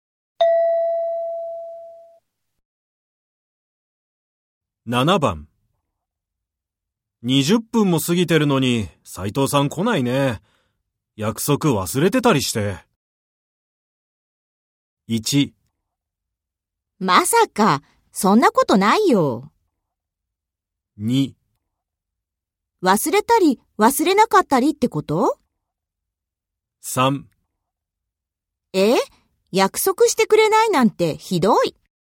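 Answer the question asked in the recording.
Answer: 1: まさか、そんなことないよ。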